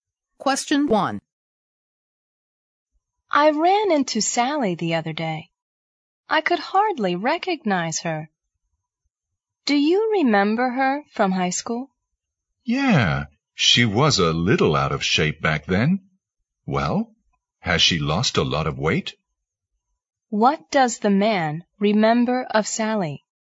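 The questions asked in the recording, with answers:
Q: What does the man remember of Sally?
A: She was a little out of shape (overweight) in high school.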